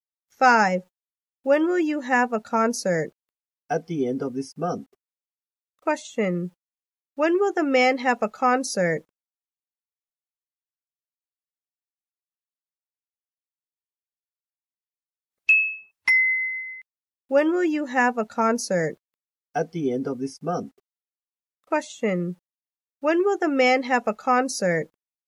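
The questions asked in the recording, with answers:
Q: Question: When will the man have a concert?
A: At the end of this month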